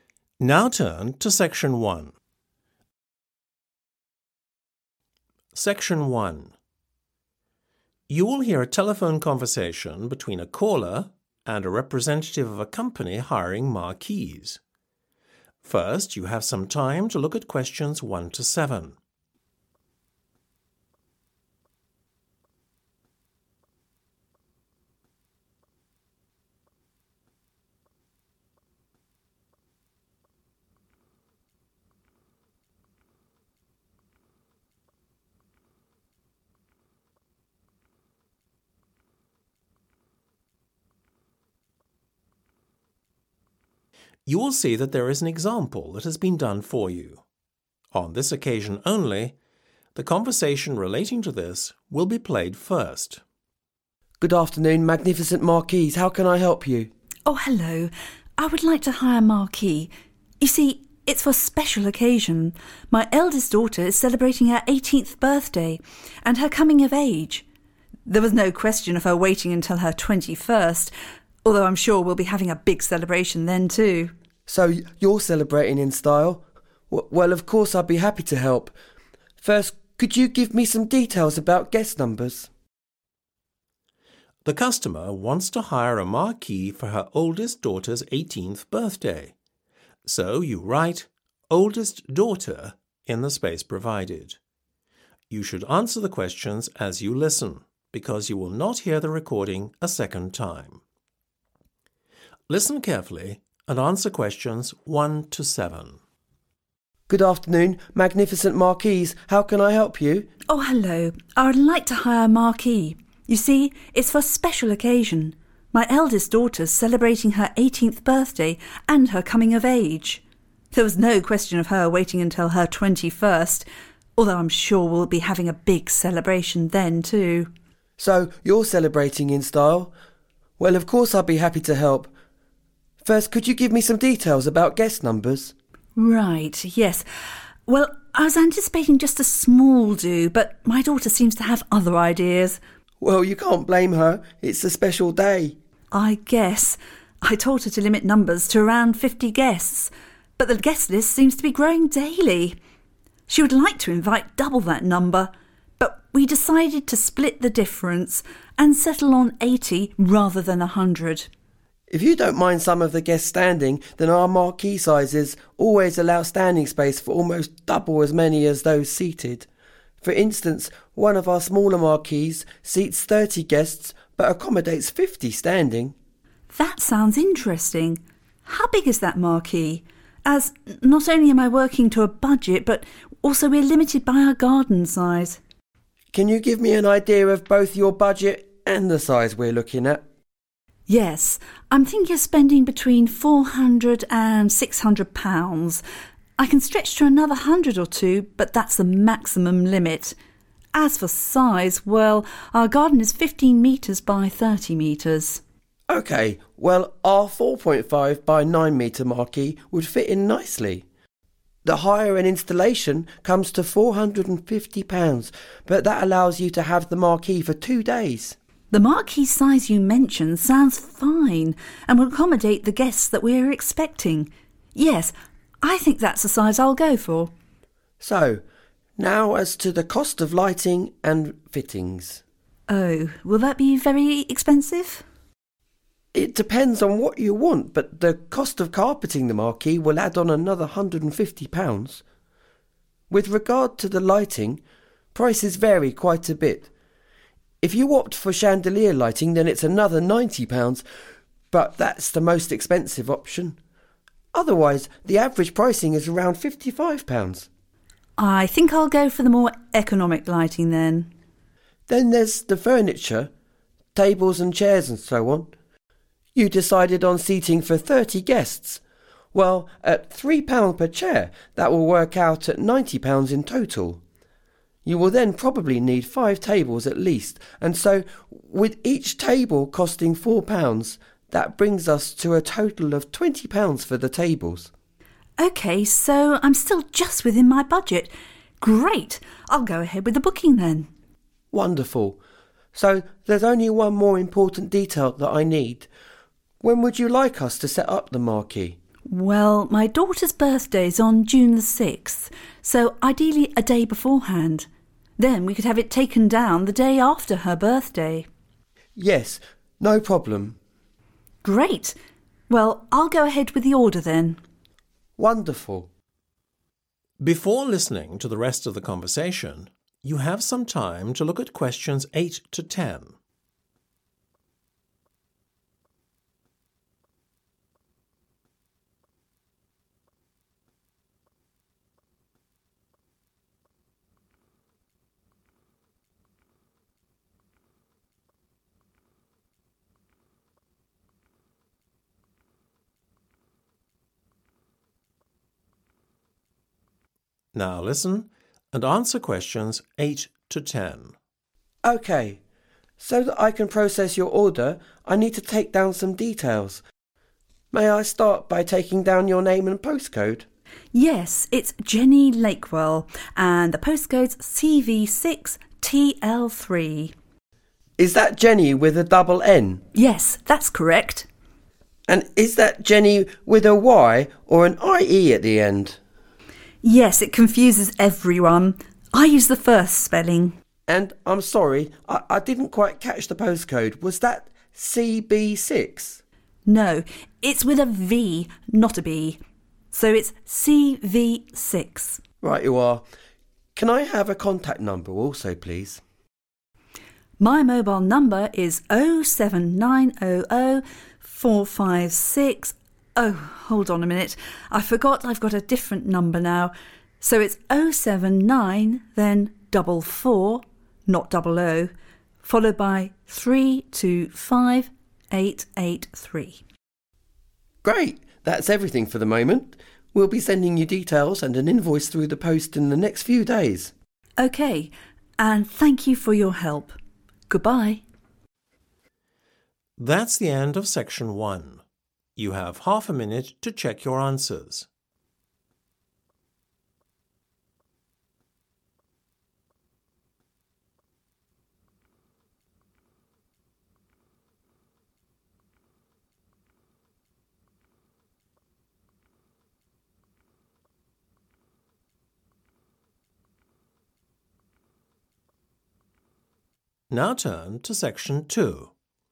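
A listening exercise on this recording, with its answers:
Complete the form below.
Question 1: Number of Guests Invited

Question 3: Marquee Size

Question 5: £150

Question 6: approximately £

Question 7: Set-up date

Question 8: Name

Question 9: Postcode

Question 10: Contact Number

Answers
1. 80
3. 4.5
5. carpeting
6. 55
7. June 5th
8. Jenny Lakewell
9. CV6TL3
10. 07944325883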